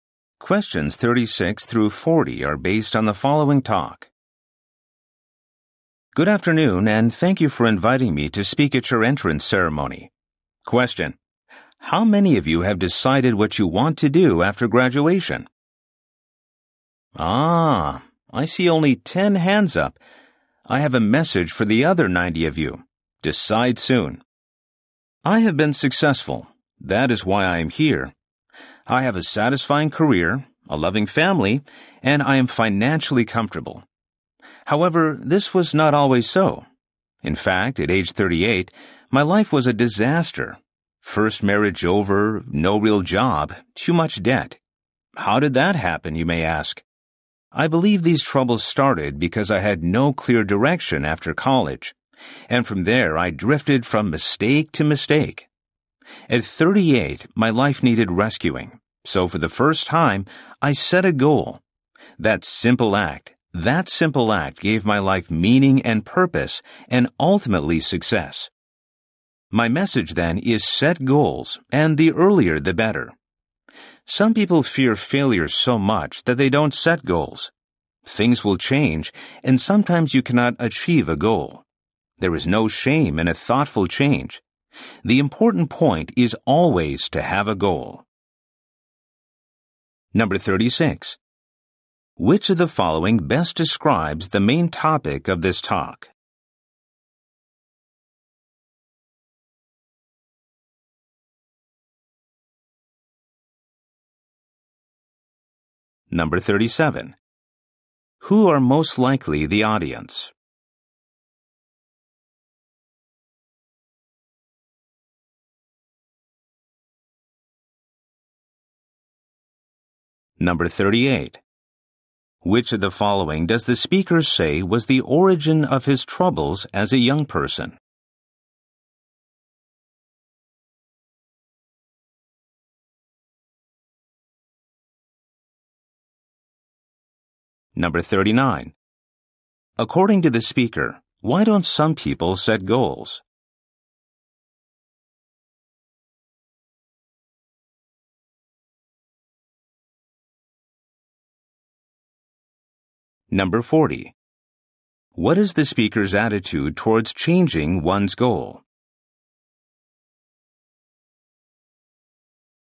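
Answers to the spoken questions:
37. New students at an entrance ceremony
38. Having no clear direction after college
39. They fear failure
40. There is no shame in a thoughtful change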